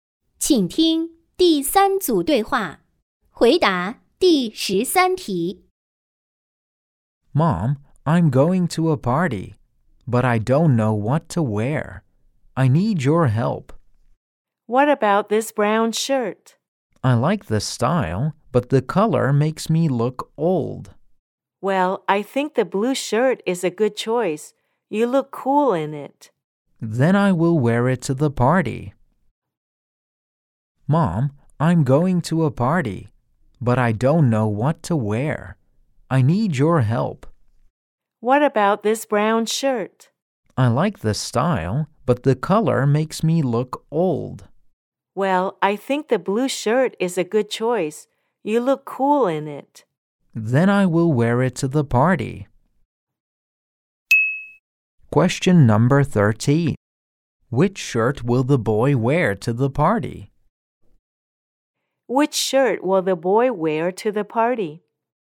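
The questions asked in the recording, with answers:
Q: Which shirt will the boy wear to the party?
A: The blue shirt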